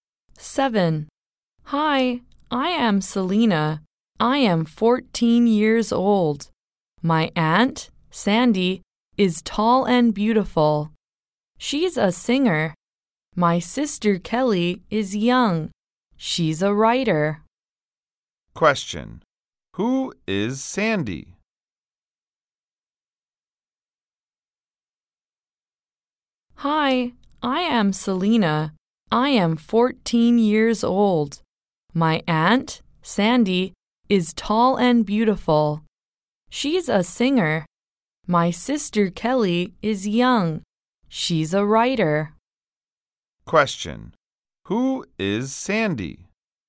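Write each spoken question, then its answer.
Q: who is Sandy?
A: Selena's aunt, a singer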